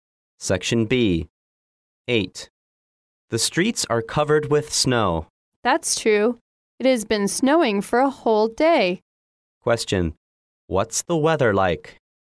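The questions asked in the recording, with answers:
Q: What's the weather like?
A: It's snowy.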